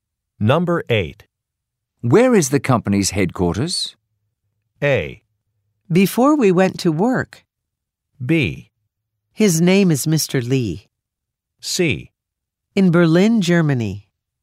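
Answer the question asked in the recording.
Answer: C: In Berlin, Germany.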